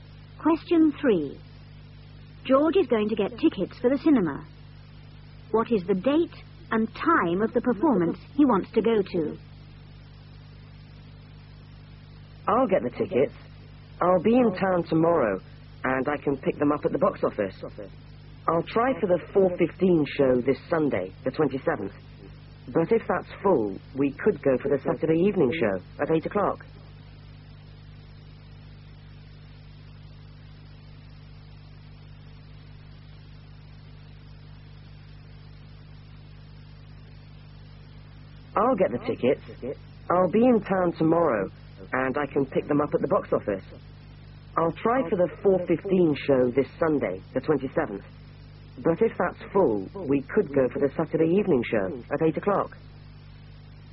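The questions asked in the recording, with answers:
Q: What is the date and time of the performance he wants to go to?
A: Sunday the 27th, at 4:15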